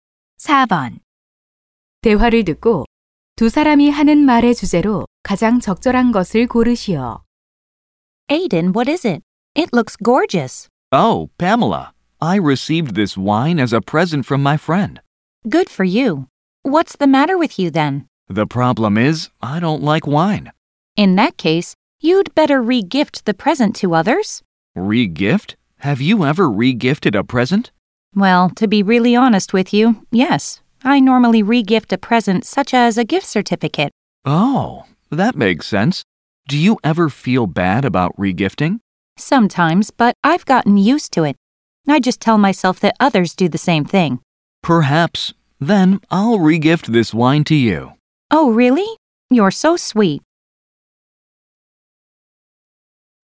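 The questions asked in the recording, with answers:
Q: 대화를 듣고 두 사람이 하는 말의 주제로 가장 적절한 것을 고르시오.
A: 받은 선물을 다른 사람에게 다시 선물하기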